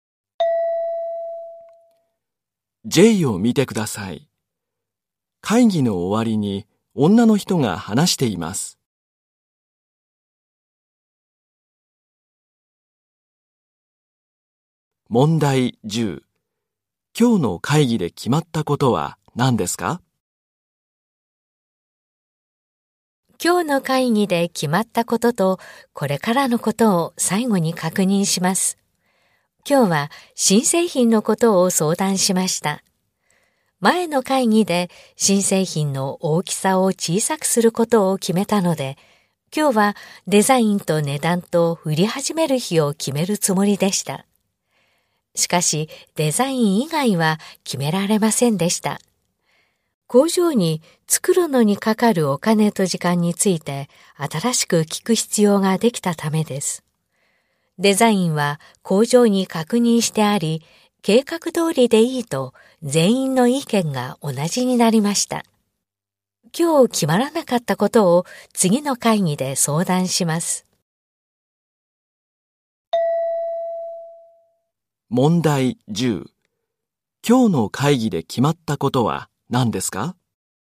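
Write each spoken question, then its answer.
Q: 今日の会議で決まったことは何ですか?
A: デザイン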